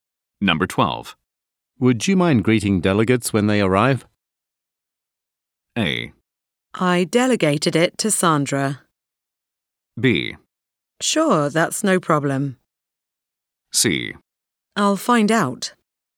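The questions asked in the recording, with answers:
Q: Would you mind greeting delegates when they arrive?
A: B: Sure, that's no problem.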